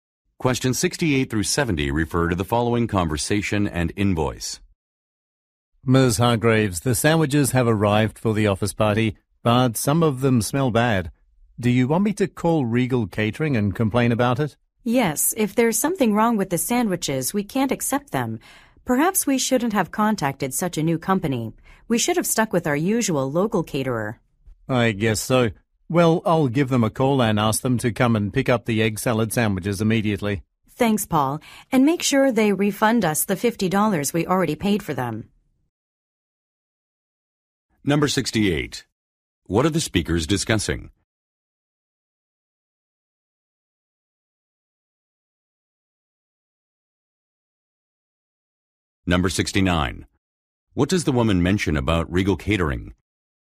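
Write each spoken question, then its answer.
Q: What are the speakers discussing?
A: Spoiled sandwiches delivered for an office party

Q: What does the woman mention about Regal Catering?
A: It is a new company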